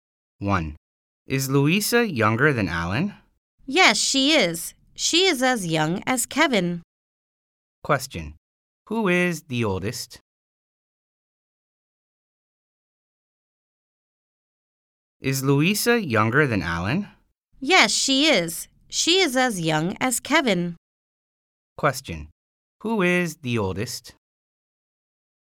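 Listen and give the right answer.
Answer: Alan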